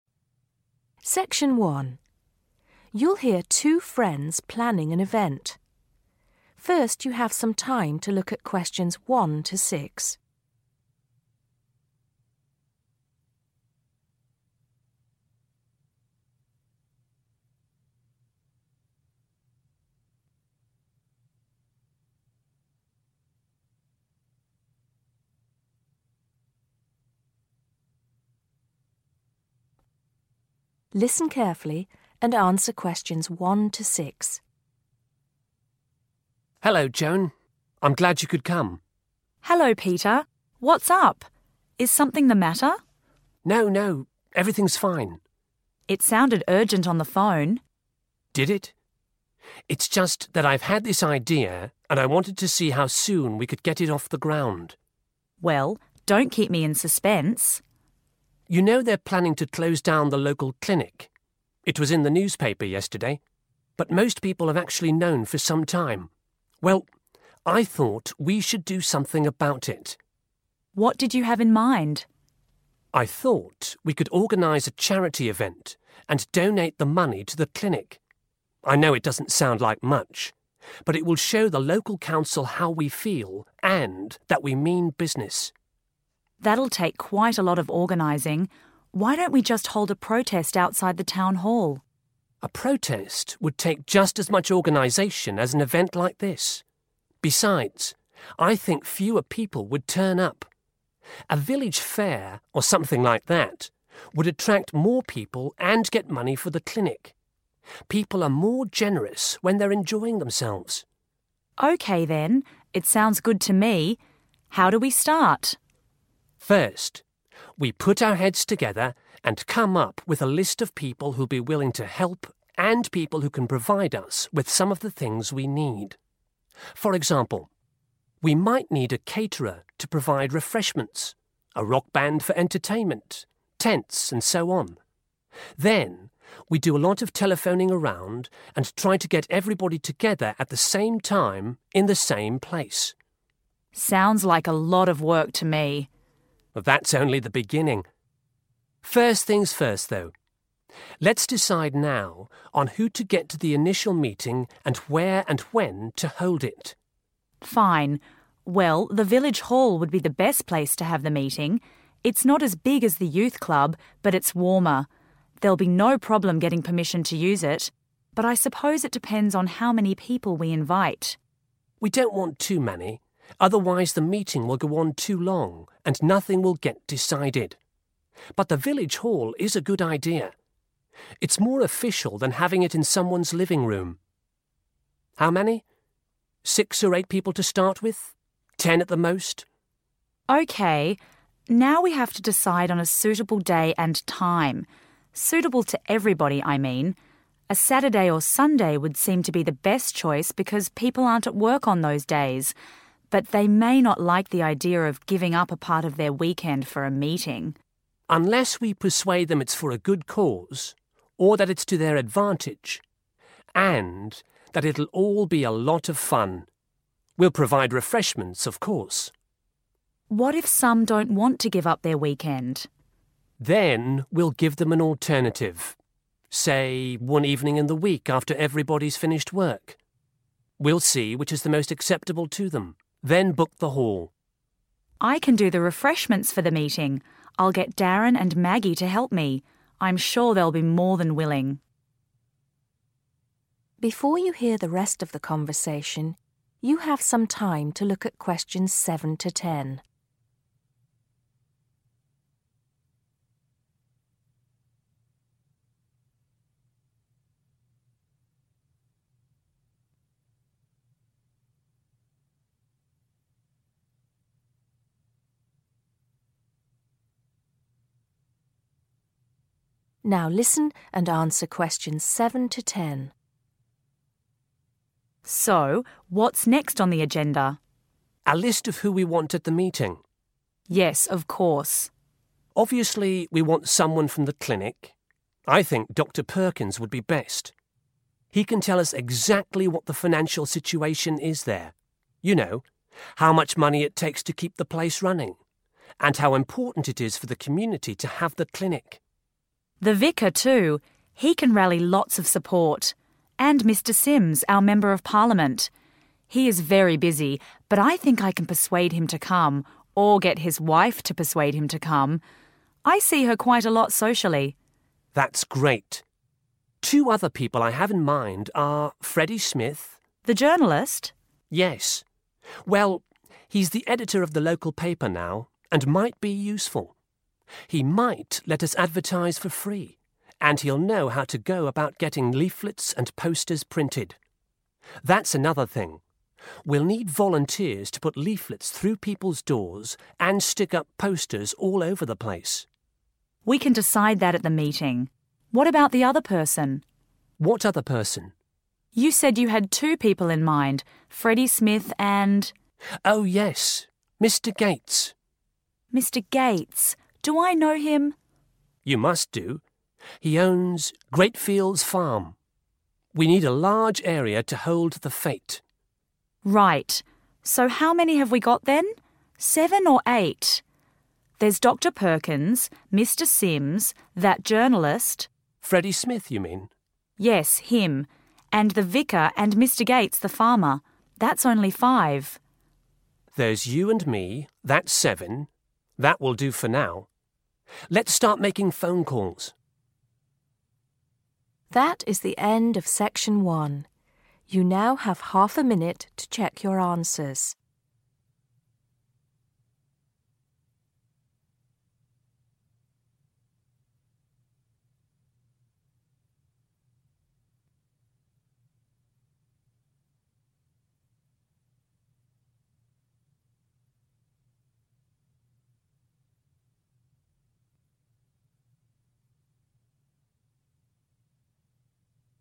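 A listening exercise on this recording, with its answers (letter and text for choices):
Answer the questions below. Write NO MORE THAN THREE WORDS for each answer.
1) What is going to be closed down?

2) What does Peter want to organise?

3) What does Joan suggest they get people to do?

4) Which of the following might they need?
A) an orchestra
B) a caterer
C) a telephonist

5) Where will they probably hold the meeting?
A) the youth club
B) somebody's living room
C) the village hall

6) When do they decide to hold the meeting?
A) they haven't decided yet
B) at the weekend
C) some time during the week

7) Dr Perkins is the best person to describe the...............at the clinic.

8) Joan often meets Mr Sims' wife............... .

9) The editor of the newspaper might let them advertise...................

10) .....................will be needed to go from door to door posting leaflets.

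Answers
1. the local clinic
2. a charity event
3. hold a protest
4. B) a caterer
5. C) the village hall
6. A) they haven't decided yet
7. financial situation
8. socially
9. for free
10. volunteers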